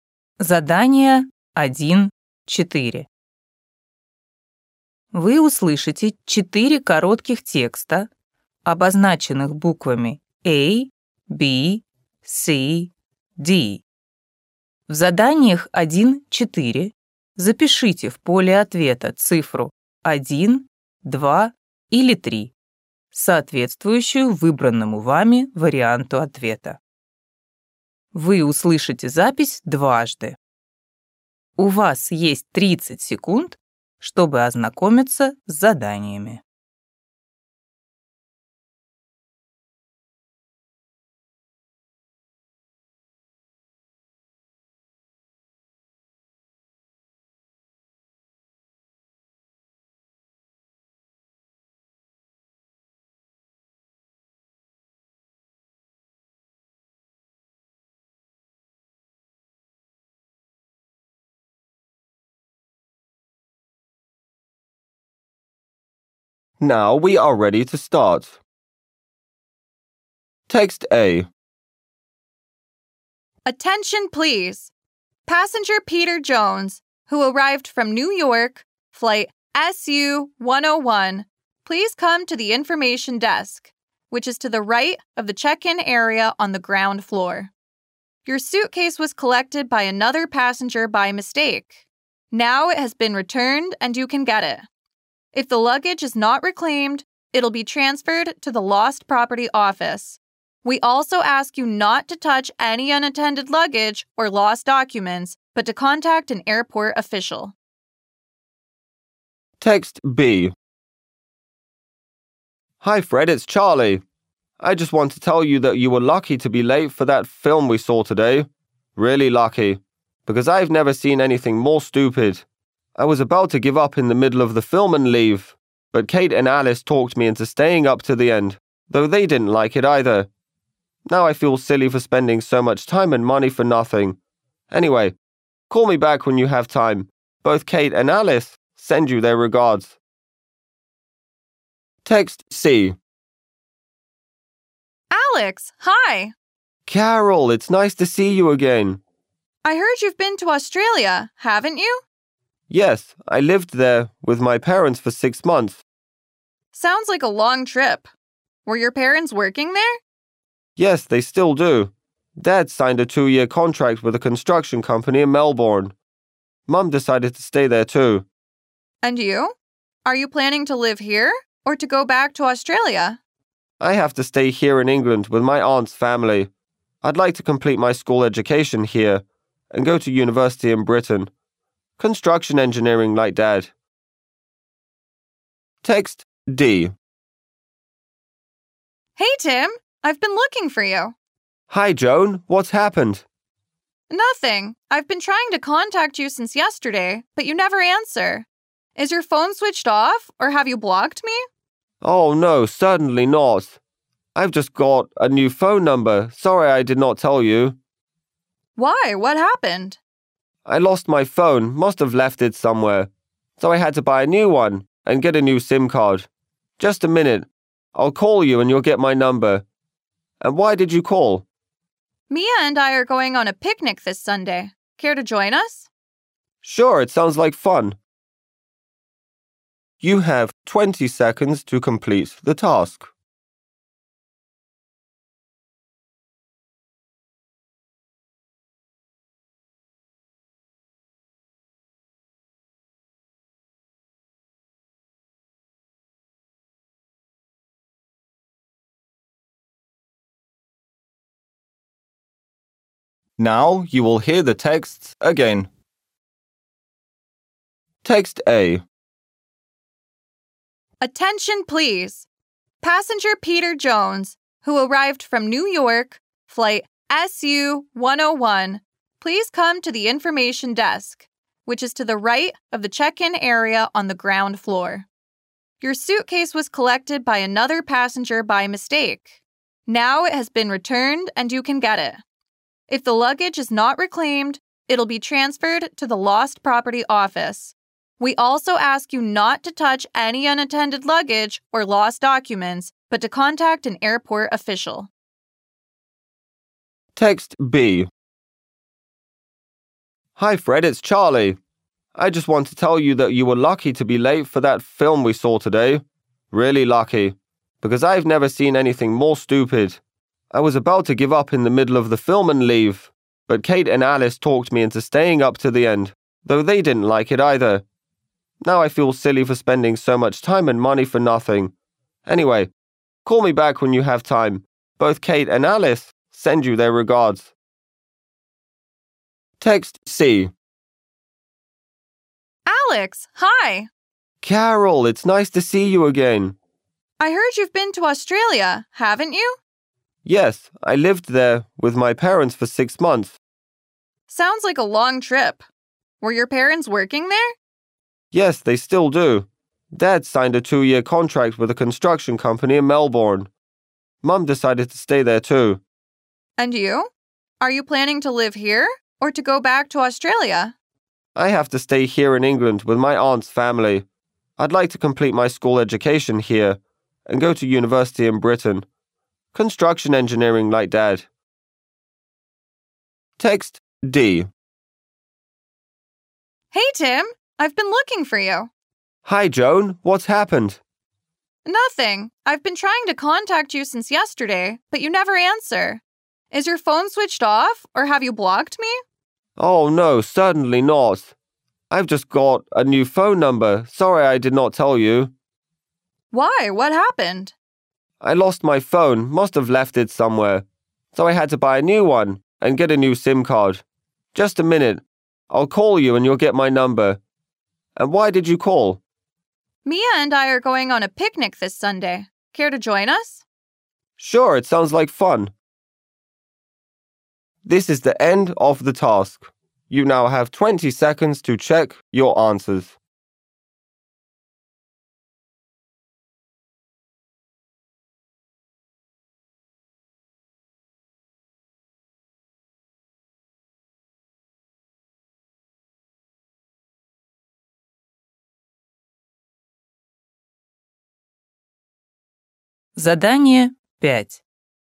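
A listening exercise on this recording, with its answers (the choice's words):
Вы услышите четыре коротких текста, обозначенных буквами А, B, C, D.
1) The airport officials are looking for a person who ...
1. has lost their luggage.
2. has missed their check-in time.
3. has found another passenger's documents.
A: has lost their luggage.

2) Charlie is calling ...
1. to say sorry for being late to the cinema.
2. to invite Fred to see a film with him.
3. to share his impressions of the film.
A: to share his impressions of the film.

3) Why did Alex spend half a year in Australia?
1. He was studying at university there.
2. His father got a job there.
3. He visited his aunt and her family.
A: His father got a job there.

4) Why was it a problem for Joan to contact Tim by phone?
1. Tim was ignoring Joan's calls.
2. Tim had forgotten to turn on his phone.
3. Tim had got a new phone number.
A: Tim had got a new phone number.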